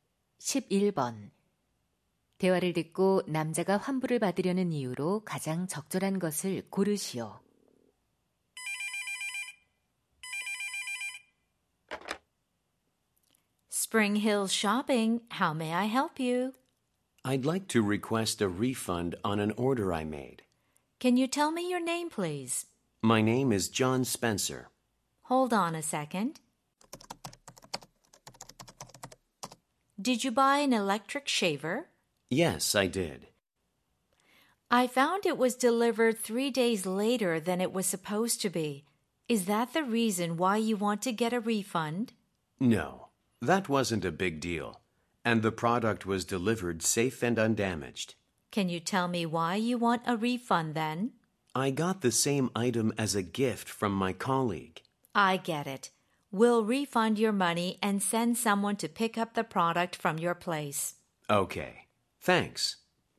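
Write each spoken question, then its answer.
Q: 대화를 듣고 남자가 환불을 받으려는 이유로 가장 적절한 것을 고르시오.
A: 동료에게서 같은 제품을 선물받아서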